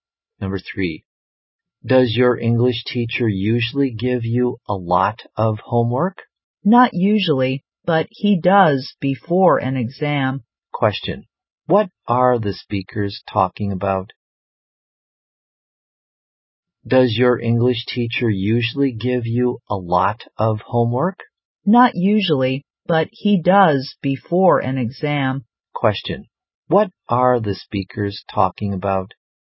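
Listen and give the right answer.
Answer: Homework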